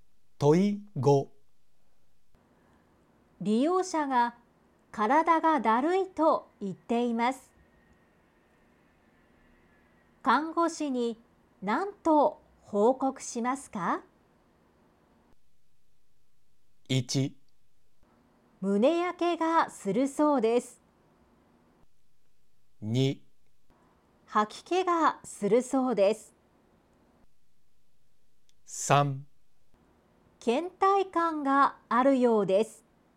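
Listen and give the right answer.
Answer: 3: 倦怠感があるようです。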